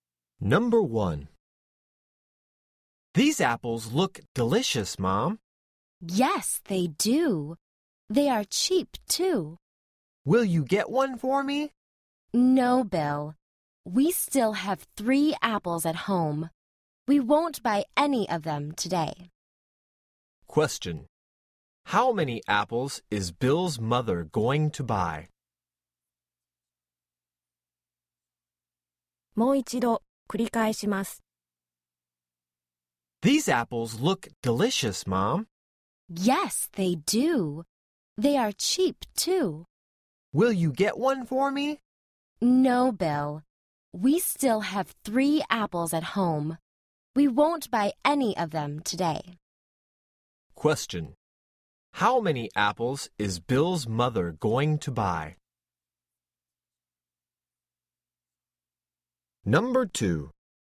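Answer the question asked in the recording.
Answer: None (zero)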